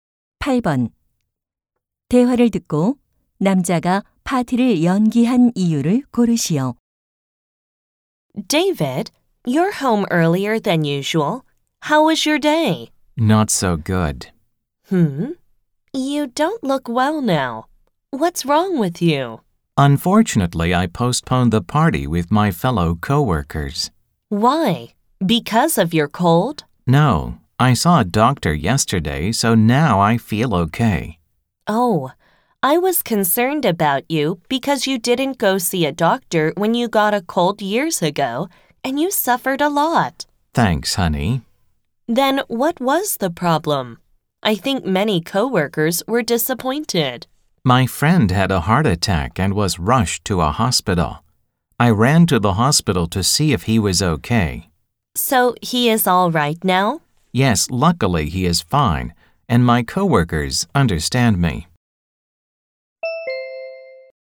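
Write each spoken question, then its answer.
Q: 대화를 듣고 남자가 파티를 연기한 이유를 고르시오.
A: 친구가 심장마비로 병원에 실려 가서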